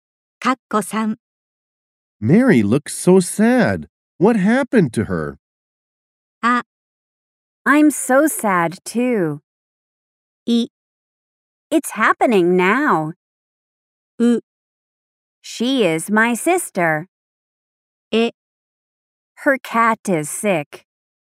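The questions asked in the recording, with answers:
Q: Mary looks so sad. What happened to her?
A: え: Her cat is sick.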